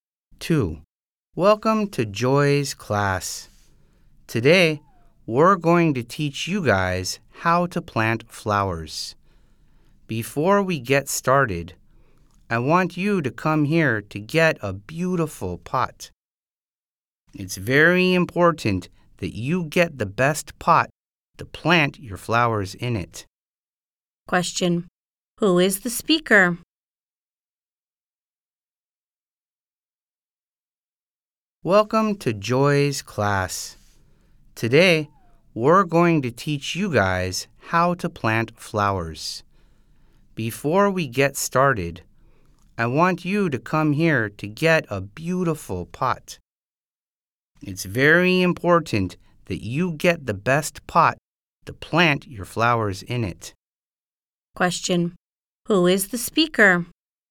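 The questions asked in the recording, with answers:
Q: Who is the speaker?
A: A teacher (of a flower-planting class)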